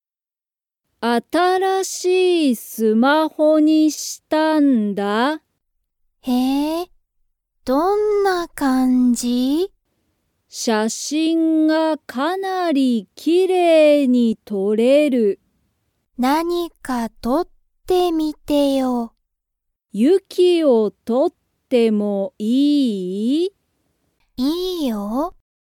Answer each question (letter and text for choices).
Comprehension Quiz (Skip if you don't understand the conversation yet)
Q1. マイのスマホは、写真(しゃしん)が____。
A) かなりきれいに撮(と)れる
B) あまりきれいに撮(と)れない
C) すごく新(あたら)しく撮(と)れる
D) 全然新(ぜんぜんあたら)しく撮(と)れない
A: A) かなりきれいに撮(と)れる

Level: Level 1